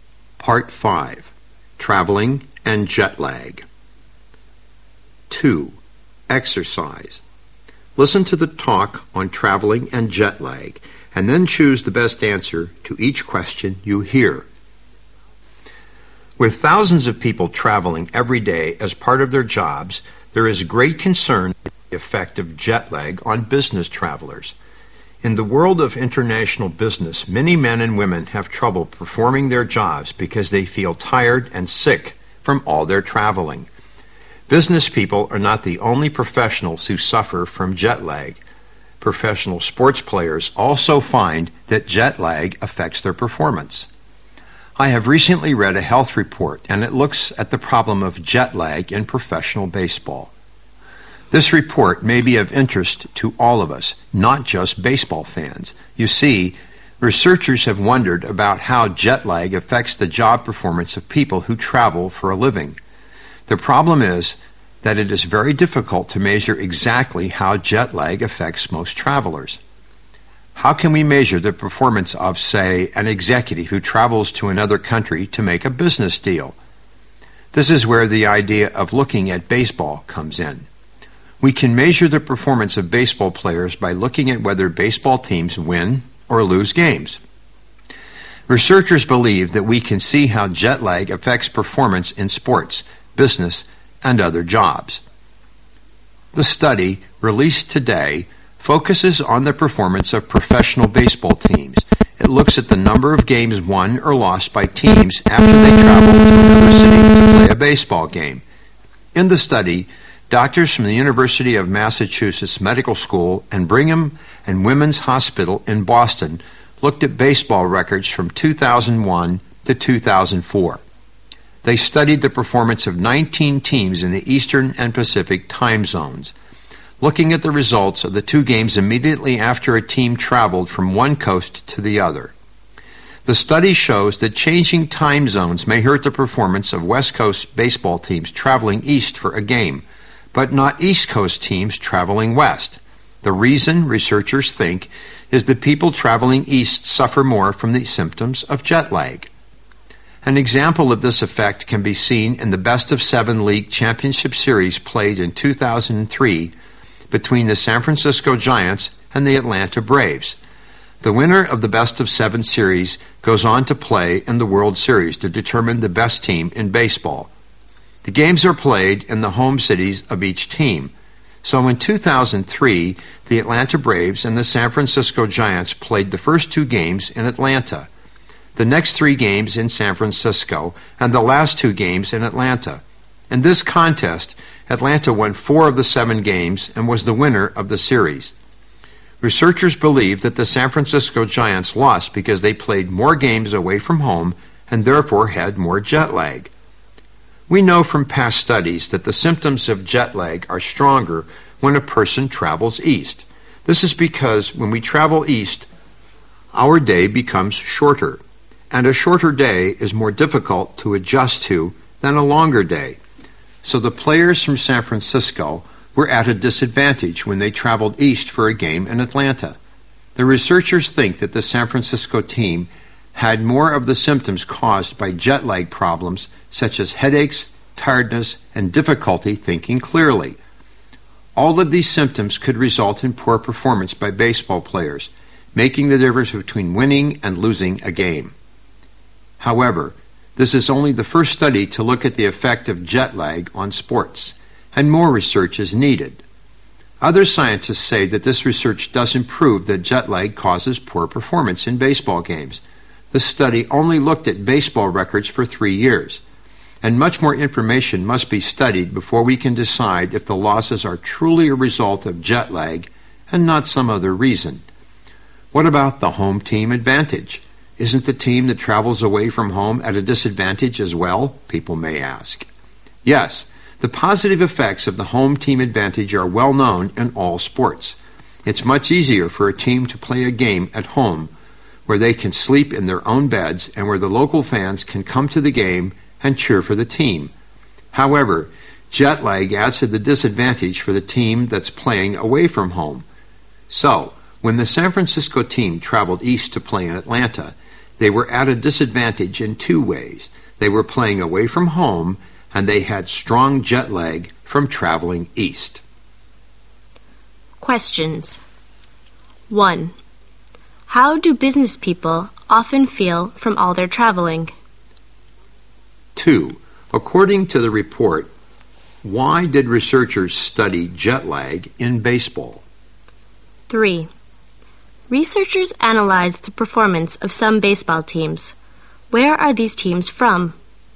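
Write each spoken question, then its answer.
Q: How do business people often feel from all their traveling?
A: Tired and sick

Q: According to the report, why did researchers study jet lag in baseball?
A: Because players' performance can be measured by whether teams win or lose games

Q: Where are these teams from?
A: The Eastern and Pacific time zones (East and West Coasts)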